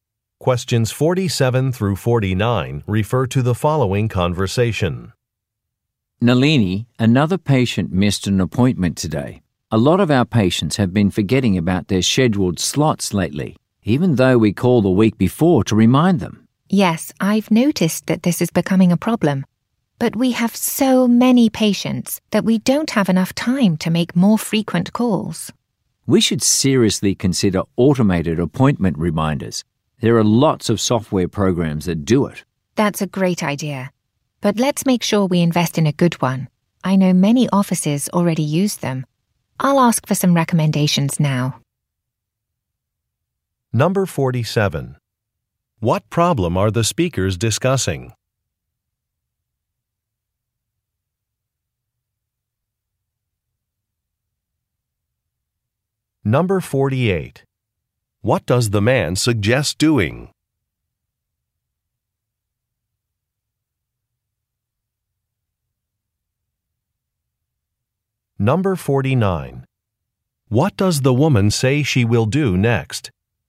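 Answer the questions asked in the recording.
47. Patients missing appointments
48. Using automated appointment reminders
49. Ask for recommendations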